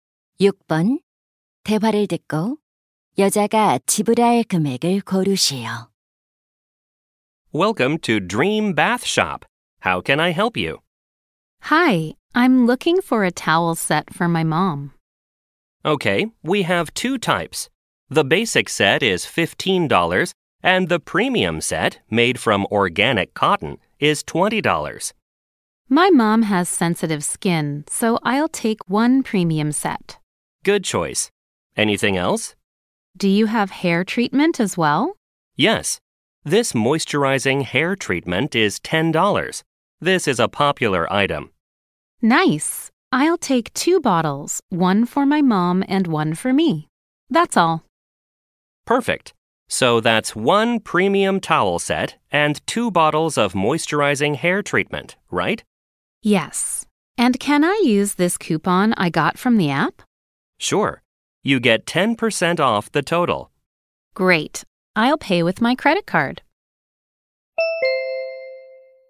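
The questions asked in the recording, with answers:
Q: 대화를 듣고 여자가 지불할 금액을 고르시오.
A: $36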